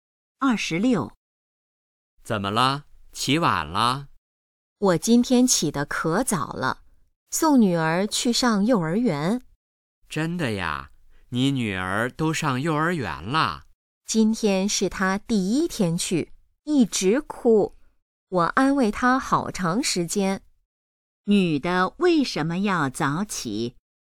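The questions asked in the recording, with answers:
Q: 女的为什么要早起?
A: 送女儿去上幼儿园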